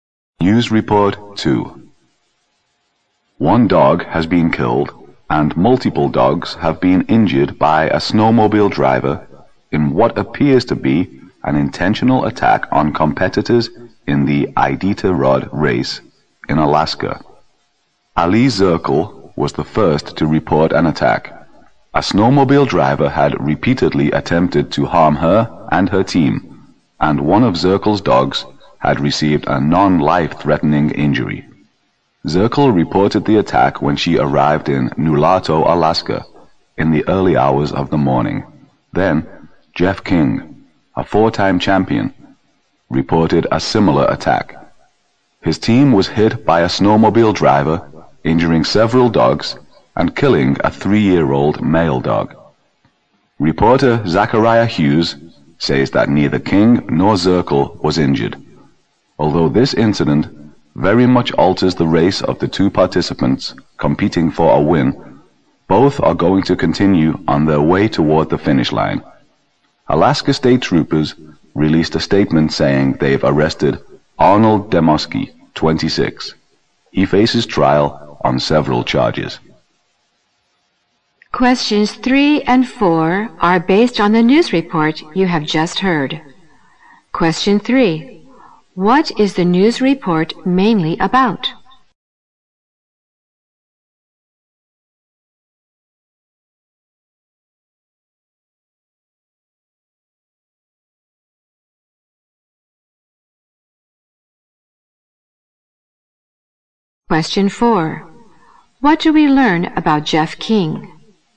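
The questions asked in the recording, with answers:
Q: What is the news report mainly about?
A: A snowmobile driver's attack on dog teams in the Iditarod race

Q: What do we learn about Jeff King?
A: He is a four-time champion whose team was hit, with one dog killed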